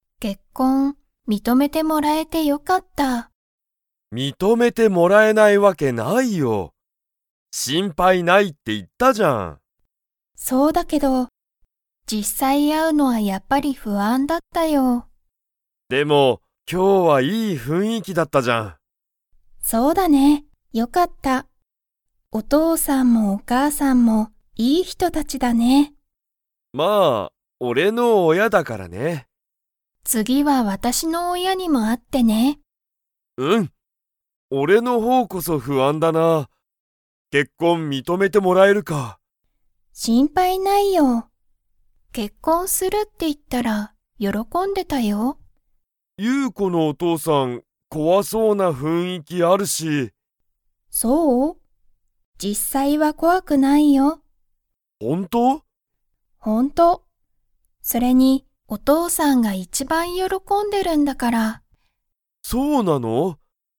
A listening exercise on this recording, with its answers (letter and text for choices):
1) ユウコは、サトルの親おやに会あうのが だった。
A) 不安ふあん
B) 楽たのしみ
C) 元気げんき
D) 無理むり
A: A) 不安ふあん

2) ユウコのお父とうさんは、実際じっさいは 。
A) 怖こわい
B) 怖こわくない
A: B) 怖こわくない

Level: Level 3